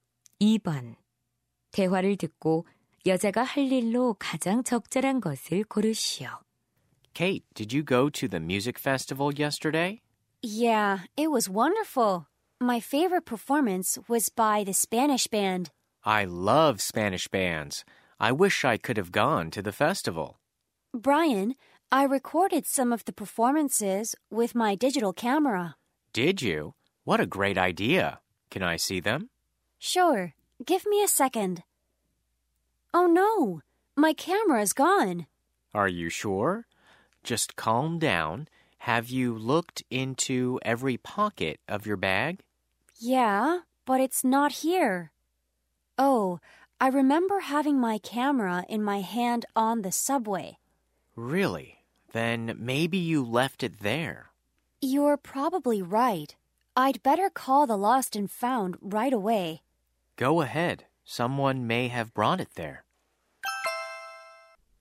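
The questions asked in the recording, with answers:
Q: 대화를 듣고 여자가 할 일로 가장 적절한 것을 고르시오.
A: 분실물 센터에 전화하기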